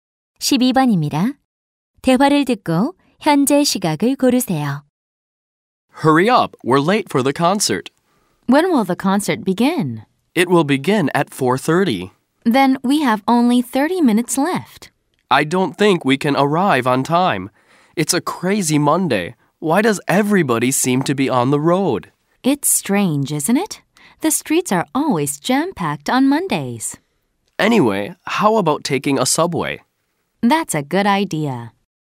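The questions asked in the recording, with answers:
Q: 대화를 듣고 현재 시각을 고르세요.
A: 4시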